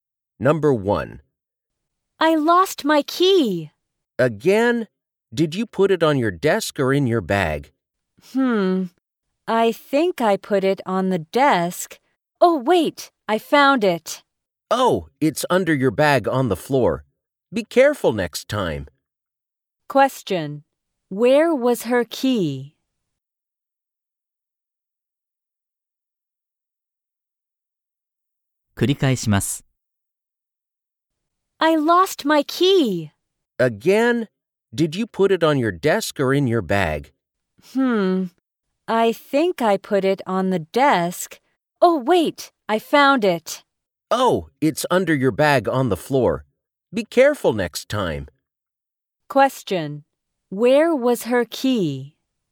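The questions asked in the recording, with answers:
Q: Where was her key?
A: Under her bag on the floor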